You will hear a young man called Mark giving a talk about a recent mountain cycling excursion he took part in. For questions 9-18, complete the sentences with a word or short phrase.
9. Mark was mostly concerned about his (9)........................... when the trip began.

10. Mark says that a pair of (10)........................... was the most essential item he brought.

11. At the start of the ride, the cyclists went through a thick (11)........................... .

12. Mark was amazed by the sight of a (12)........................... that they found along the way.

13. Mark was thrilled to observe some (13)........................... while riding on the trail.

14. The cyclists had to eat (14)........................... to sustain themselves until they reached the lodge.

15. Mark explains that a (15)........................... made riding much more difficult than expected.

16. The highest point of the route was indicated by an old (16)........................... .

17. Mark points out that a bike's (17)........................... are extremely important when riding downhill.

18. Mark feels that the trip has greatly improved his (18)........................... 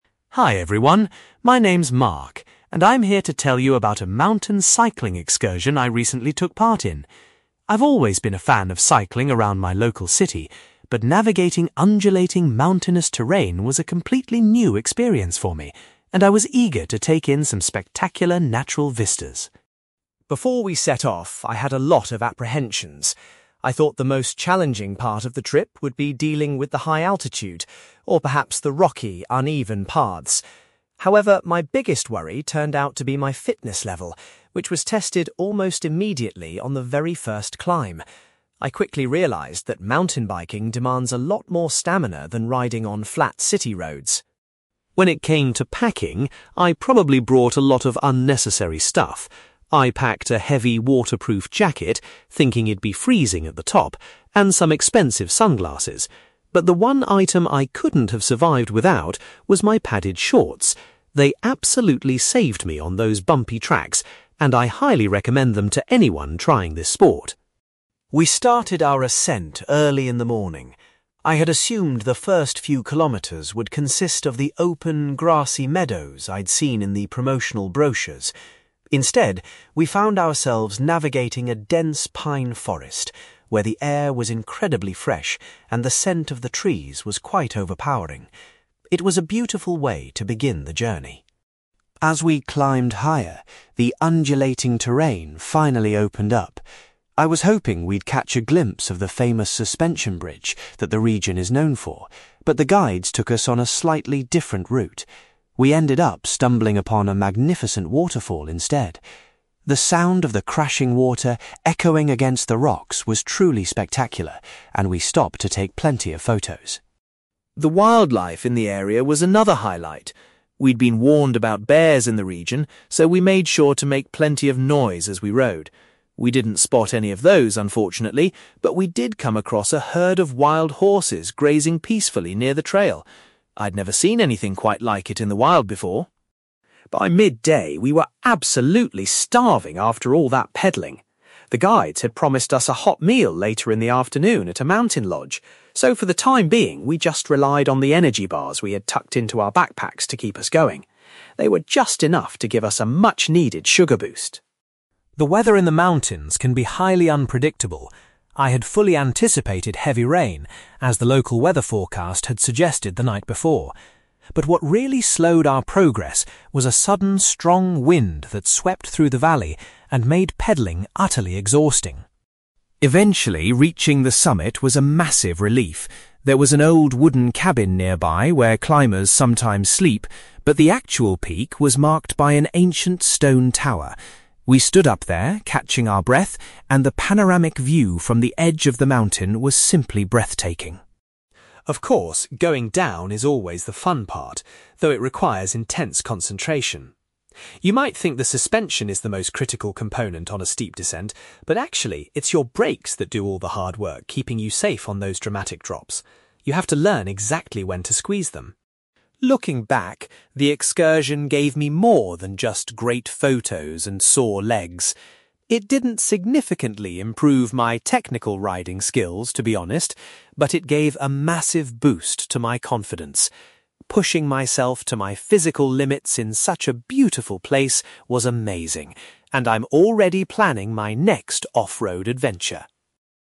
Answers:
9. fitness level
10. padded shorts
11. pine forest
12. waterfall
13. wild horses
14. energy bars
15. strong wind
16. stone tower
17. brakes
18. confidence

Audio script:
Mark: Hi everyone! My name's Mark, and I'm here to tell you about a mountain cycling excursion I recently took part in. I've always been a fan of cycling around my local city, but navigating undulating, mountainous terrain was a completely new experience for me, and I was eager to take in some spectacular natural vistas.
Before we set off, I had a lot of apprehensions. I thought the most challenging part of the trip would be dealing with the high altitude, or perhaps the rocky, uneven paths. However, my biggest worry turned out to be my fitness level, which was tested almost immediately on the very first climb. I quickly realised that mountain biking demands a lot more stamina than riding on flat city roads!
When it came to packing, I probably brought a lot of unnecessary stuff. I packed a heavy waterproof jacket, thinking it'd be freezing at the top, and some expensive sunglasses. But the one item I couldn't have survived without was my padded shorts. They absolutely saved me on those bumpy tracks, and I highly recommend them to anyone trying this sport.
We started our ascent early in the morning. I had assumed the first few kilometres would consist of the open, grassy meadows I'd seen in the promotional brochures. Instead, we found ourselves navigating a dense pine forest, where the air was incredibly fresh and the scent of the trees was quite overpowering. It was a beautiful way to begin the journey.
As we climbed higher, the undulating terrain finally opened up. I was hoping we'd catch a glimpse of the famous suspension bridge that the region is known for, but the guides took us on a slightly different route. We ended up stumbling upon a magnificent waterfall instead. The sound of the crashing water echoing against the rocks was truly spectacular, and we stopped to take plenty of photos.
The wildlife in the area was another highlight. We'd been warned about bears in the region, so we made sure to make plenty of noise as we rode. We didn't spot any of those, unfortunately, but we did come across a herd of wild horses grazing peacefully near the trail. I'd never seen anything quite like it in the wild before.
By midday, we were absolutely starving after all that pedalling. The guides had promised us a hot meal later in the afternoon at a mountain lodge, so for the time being, we just relied on the energy bars we had tucked into our backpacks to keep us going. They were just enough to give us a much-needed sugar boost.
The weather in the mountains can be highly unpredictable. I had fully anticipated heavy rain, as the local weather forecast had suggested the night before. But what really slowed our progress was a sudden, strong wind that swept through the valley and made pedalling utterly exhausting.
Eventually, reaching the summit was a massive relief. There was an old wooden cabin nearby where climbers sometimes sleep, but the actual peak was marked by an ancient stone tower. We stood up there, catching our breath, and the panoramic view from the edge of the mountain was simply breathtaking.
Of course, going down is always the fun part, though it requires intense concentration. You might think the suspension is the most critical component on a steep descent, but actually, it's your brakes that do all the hard work keeping you safe on those dramatic drops. You have to learn exactly when to squeeze them.
Looking back, the excursion gave me more than just great photos and sore legs. It didn't significantly improve my technical riding skills, to be honest, but it gave a massive boost to my confidence. Pushing myself to my physical limits in such a beautiful place was amazing, and I'm already planning my next off-road adventure.

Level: B2